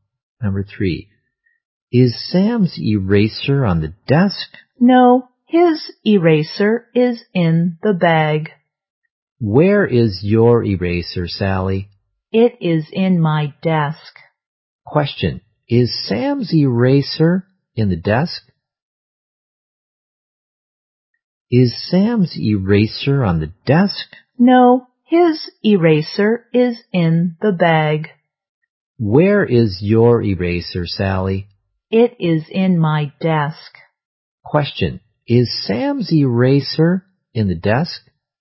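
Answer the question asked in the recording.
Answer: No, it's in the bag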